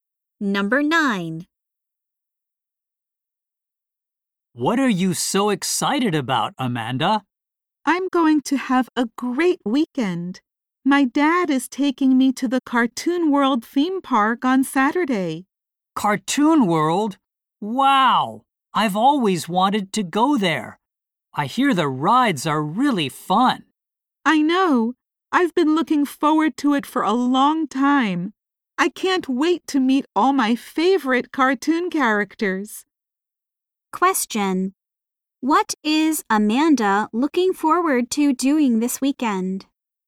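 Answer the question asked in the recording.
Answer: Going to the Cartoon World theme park and meeting her favorite cartoon characters.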